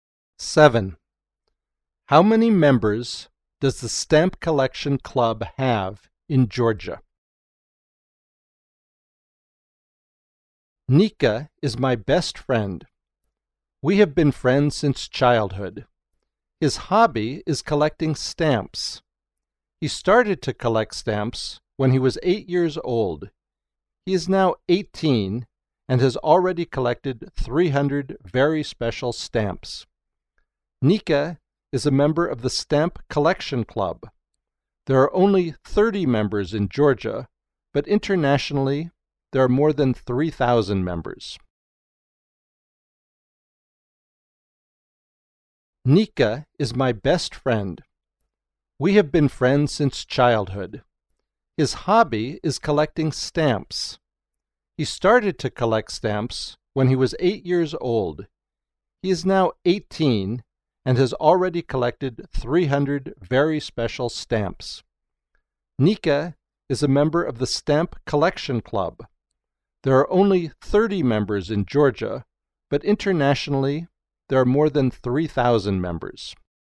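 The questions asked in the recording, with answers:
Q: How many members does the Stamp Collection Club have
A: 30 in Georgia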